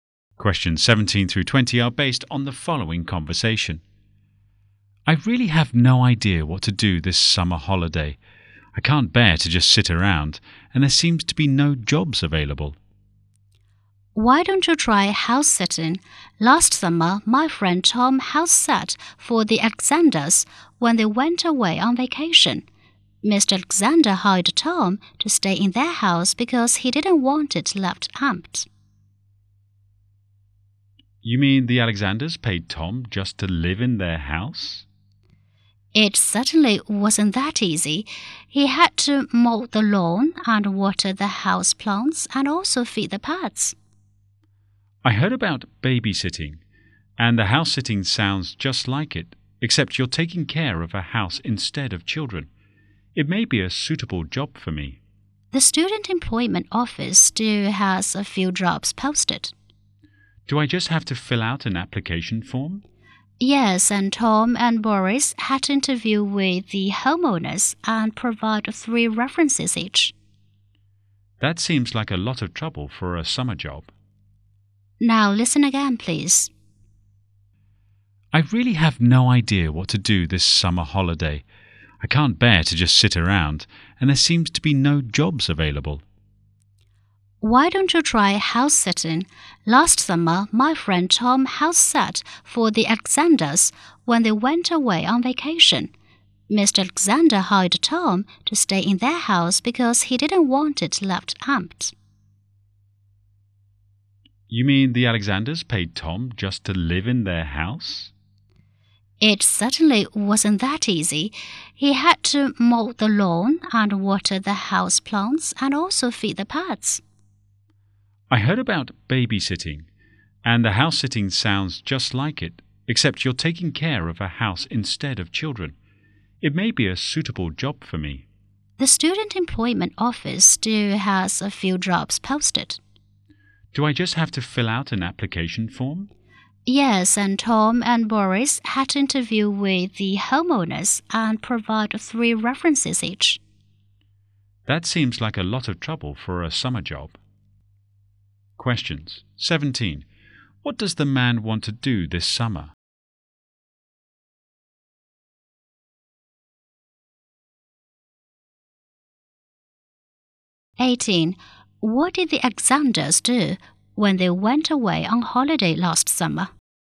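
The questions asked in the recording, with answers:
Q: What does the man want to do this summer?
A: Find a summer job

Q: What did the Alexanders do when they went away on holiday last summer?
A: They hired Tom to house-sit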